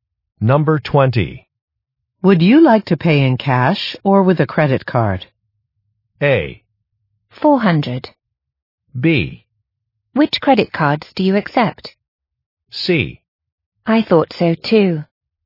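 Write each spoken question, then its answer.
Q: Would you like to pay in cash or with a credit card?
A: B: Which credit cards do you accept?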